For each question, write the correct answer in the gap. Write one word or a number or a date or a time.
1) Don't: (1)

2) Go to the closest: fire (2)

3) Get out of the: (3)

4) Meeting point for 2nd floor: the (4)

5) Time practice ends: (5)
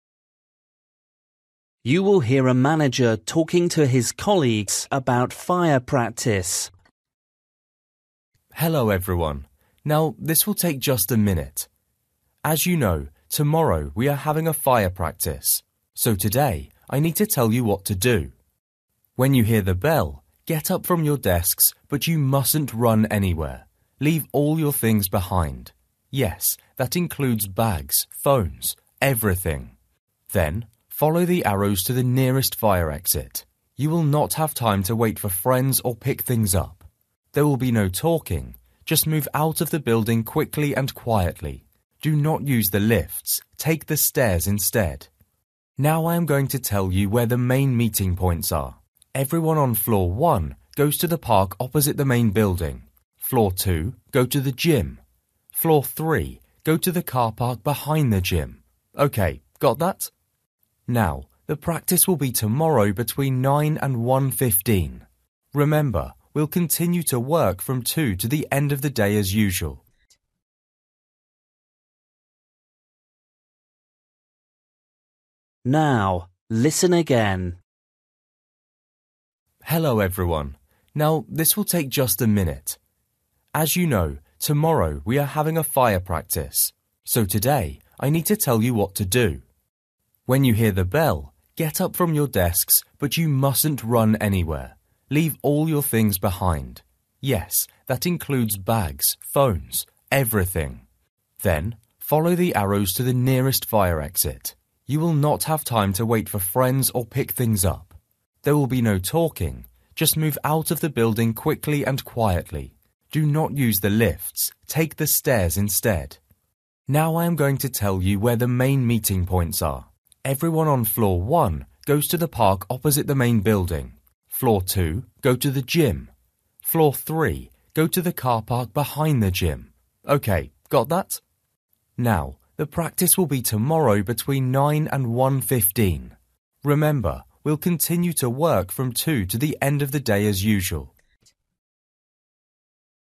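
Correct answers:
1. run
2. exit
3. building
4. gym
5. 1:15

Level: Luyện nghe trình độ A2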